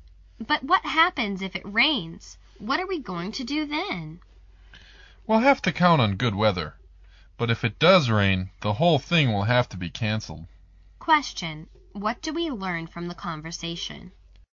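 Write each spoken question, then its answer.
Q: What do we learn from the conversation?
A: The event will be canceled if it rains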